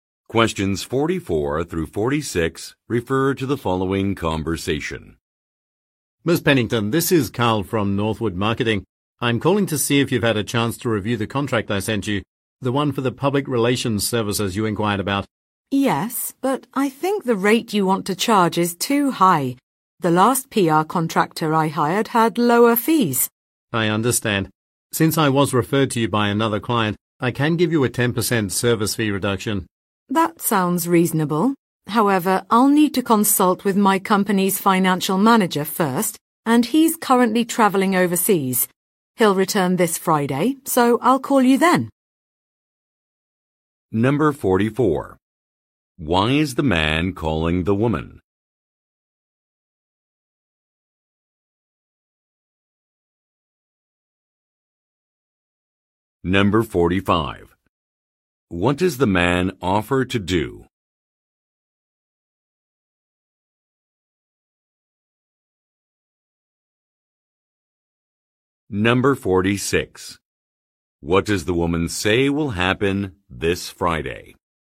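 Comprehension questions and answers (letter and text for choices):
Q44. Why is the man calling the woman?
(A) To conduct an interview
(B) To inquire about a document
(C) To confirm travel plans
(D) To promote a product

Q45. What does the man offer to do?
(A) Organize a business trip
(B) Arrange a public event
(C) Revise an itinerary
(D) Provide a discount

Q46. What does the woman say will happen this Friday?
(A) Her colleague will come back.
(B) Her salary will be increased.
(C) She will receive some coupons.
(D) She will hire a consultant.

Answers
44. (B) To inquire about a document
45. (D) Provide a discount
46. (A) Her colleague will come back.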